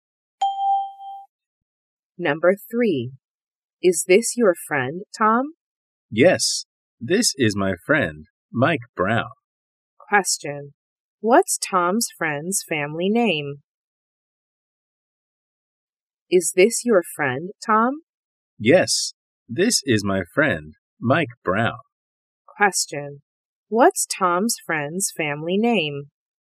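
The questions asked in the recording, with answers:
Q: What's Tom's friend's family name?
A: Brown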